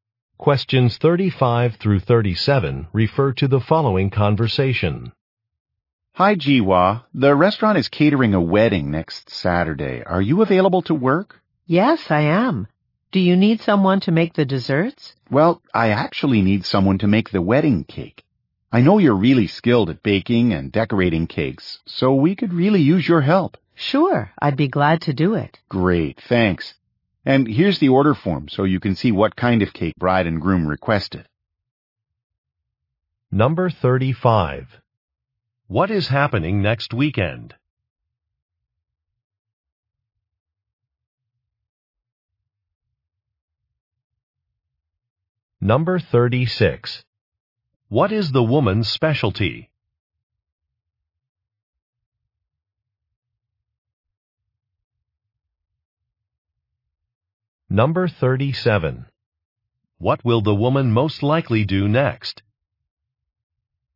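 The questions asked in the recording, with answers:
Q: What is happening next weekend?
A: The restaurant is catering a wedding

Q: What is the woman's specialty?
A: Baking and decorating cakes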